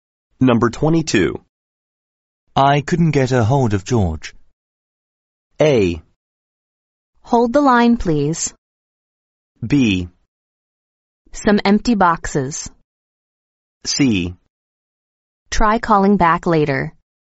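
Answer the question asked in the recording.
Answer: C: Try calling back later.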